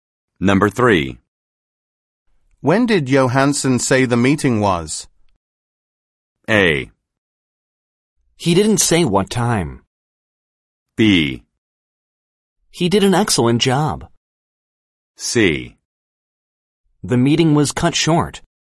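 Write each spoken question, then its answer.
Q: When did Johansson say the meeting was?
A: A: He didn't say what time.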